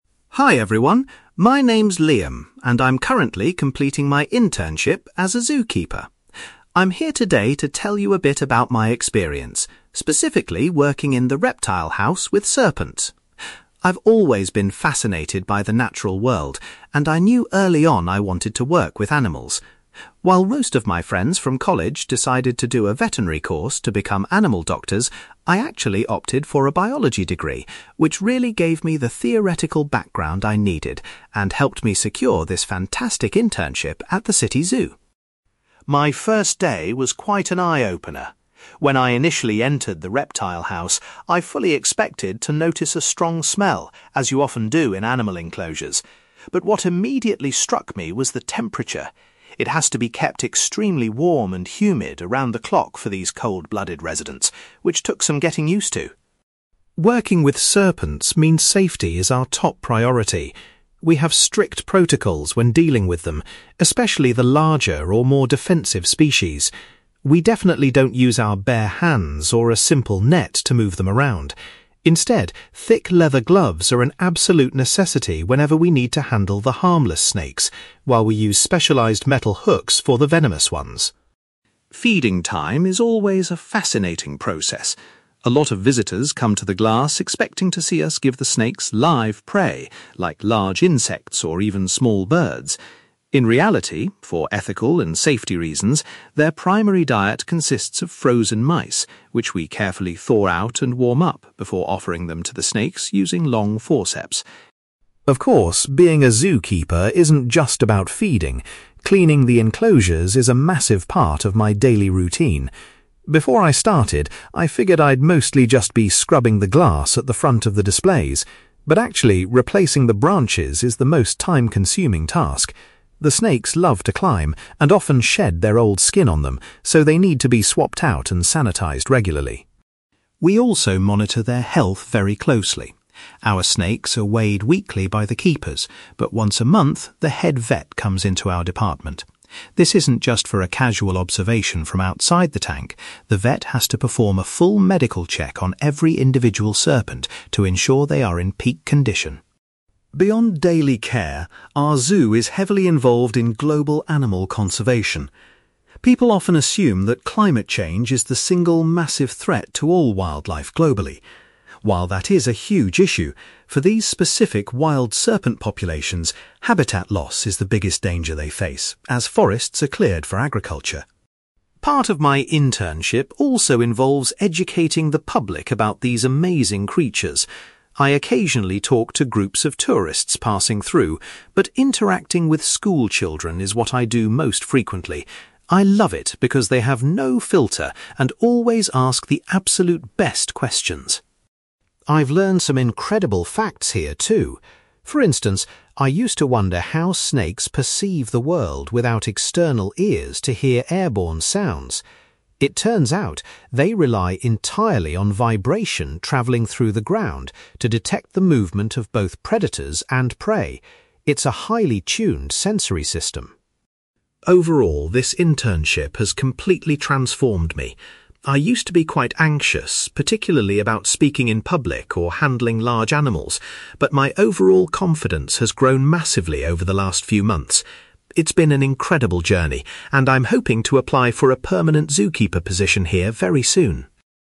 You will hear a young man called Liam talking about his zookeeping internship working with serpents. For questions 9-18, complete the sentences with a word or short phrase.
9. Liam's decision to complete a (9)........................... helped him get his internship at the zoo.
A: biology degree

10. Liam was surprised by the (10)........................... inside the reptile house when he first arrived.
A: temperature

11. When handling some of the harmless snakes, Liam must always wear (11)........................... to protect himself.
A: gloves

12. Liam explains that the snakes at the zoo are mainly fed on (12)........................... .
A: frozen mice

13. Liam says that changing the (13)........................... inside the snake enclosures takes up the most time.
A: branches

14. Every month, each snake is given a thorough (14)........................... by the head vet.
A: medical check

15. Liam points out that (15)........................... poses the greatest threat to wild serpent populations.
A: habitat loss

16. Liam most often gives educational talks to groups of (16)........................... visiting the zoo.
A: school children

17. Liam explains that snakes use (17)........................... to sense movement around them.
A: vibration

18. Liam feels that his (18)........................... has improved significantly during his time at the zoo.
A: confidence

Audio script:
Liam: Hi everyone, my name is Liam, and I'm currently completing my internship as a zookeeper. I'm here today to tell you a bit about my experience, specifically working in the reptile house with serpents. I've always been fascinated by the natural world, and I knew early on I wanted to work with animals. While most of my friends from college decided to do a veterinary course to become animal doctors, I actually opted for a biology degree, which really gave me the theoretical background I needed and helped me secure this fantastic internship at the city zoo.
My first day was quite an eye-opener. When I initially entered the reptile house, I fully expected to notice a strong smell, as you often do in animal enclosures. But what immediately struck me was the temperature. It has to be kept extremely warm and humid around the clock for these cold-blooded residents, which took some getting used to!
Working with serpents means safety is our top priority. We have strict protocols when dealing with them, especially the larger or more defensive species. We definitely don't use our bare hands or a simple net to move them around. Instead, thick leather gloves are an absolute necessity whenever we need to handle the harmless snakes, while we use specialized metal hooks for the venomous ones.
Feeding time is always a fascinating process. A lot of visitors come to the glass expecting to see us give the snakes live prey, like large insects or even small birds. In reality, for ethical and safety reasons, their primary diet consists of frozen mice, which we carefully thaw out and warm up before offering them to the snakes using long forceps.
Of course, being a zookeeper isn't just about feeding; cleaning the enclosures is a massive part of my daily routine. Before I started, I figured I'd mostly just be scrubbing the glass at the front of the displays. But actually, replacing the branches is the most time-consuming task. The snakes love to climb and often shed their old skin on them, so they need to be swapped out and sanitized regularly.
We also monitor their health very closely. Our snakes are weighed weekly by the keepers, but once a month, the head vet comes into our department. This isn't just for a casual observation from outside the tank; the vet has to perform a full medical check on every individual serpent to ensure they are in peak condition.
Beyond daily care, our zoo is heavily involved in global animal conservation. People often assume that climate change is the single massive threat to all wildlife globally. While that is a huge issue, for these specific wild serpent populations, habitat loss is the biggest danger they face, as forests are cleared for agriculture.
Part of my internship also involves educating the public about these amazing creatures. I occasionally talk to groups of tourists passing through, but interacting with school children is what I do most frequently. I love it because they have no filter and always ask the absolute best questions!
I've learned some incredible facts here, too. For instance, I used to wonder how snakes perceive the world without external ears to hear airborne sounds. It turns out, they rely entirely on vibration travelling through the ground to detect the movement of both predators and prey. It's a highly tuned sensory system.
Overall, this internship has completely transformed me. I used to be quite anxious, particularly about speaking in public or handling large animals, but my overall confidence has grown massively over the last few months. It's been an incredible journey, and I'm hoping to apply for a permanent zookeeper position here very soon.

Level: B2